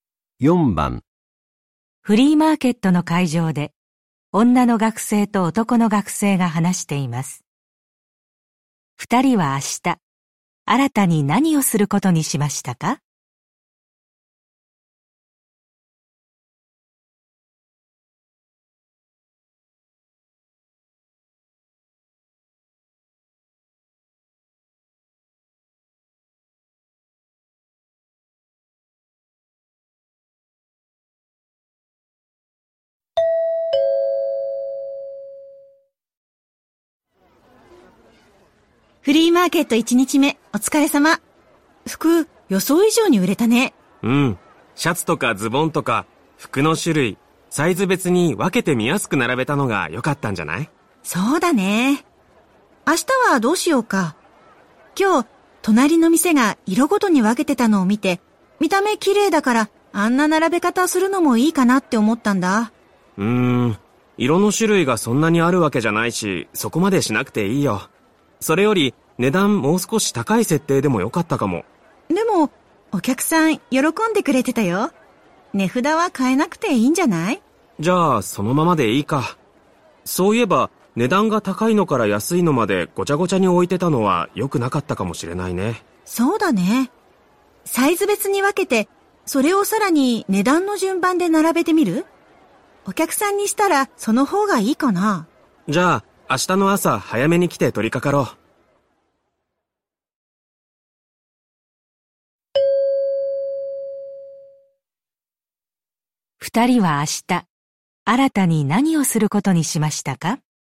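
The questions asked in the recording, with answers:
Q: 二人は明日新たに何をすることにしましたか?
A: サイズ別の服を値段の順番で並べる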